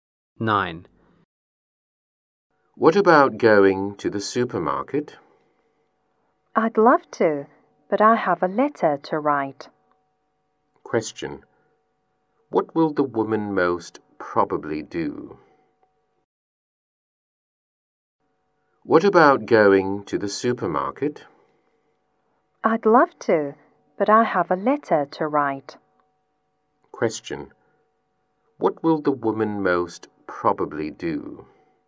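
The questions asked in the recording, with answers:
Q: Question. What will the woman most probably do?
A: Write a letter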